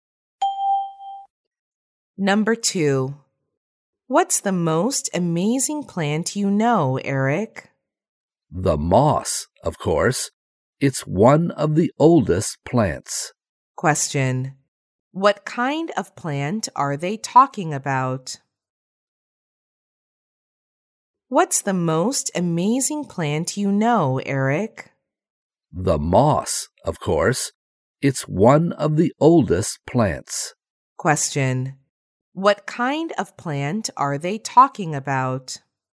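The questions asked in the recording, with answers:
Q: What kind of plant are they talking about?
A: The moss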